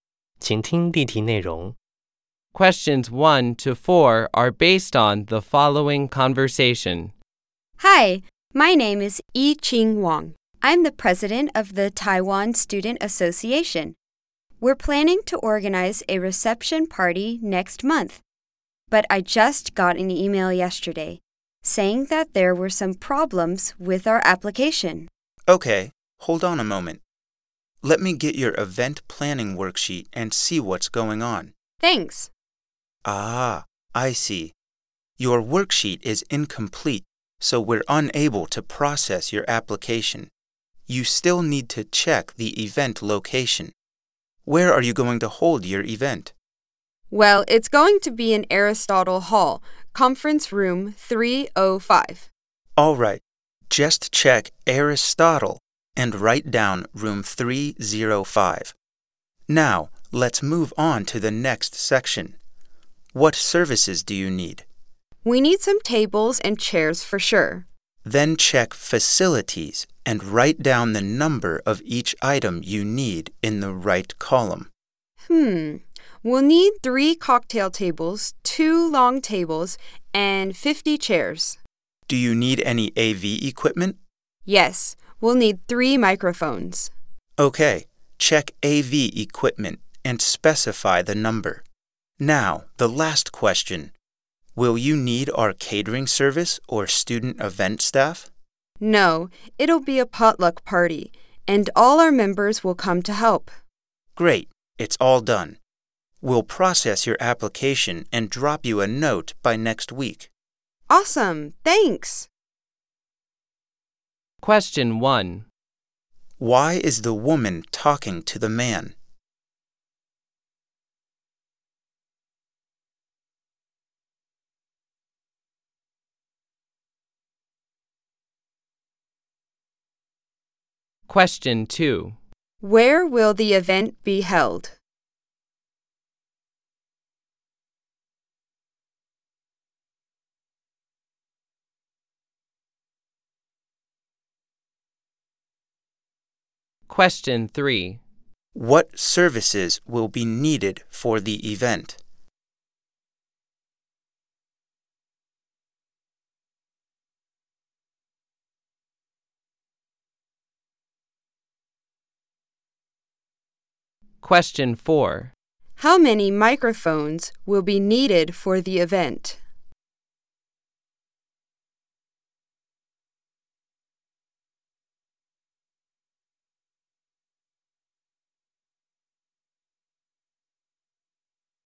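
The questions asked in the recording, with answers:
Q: Why is the woman talking to the man?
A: Her event application worksheet is incomplete and needs to be fixed

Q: Where will the event be held?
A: Aristotle Hall, Conference Room 305

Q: What services will be needed for the event?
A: Facilities (tables and chairs) and AV equipment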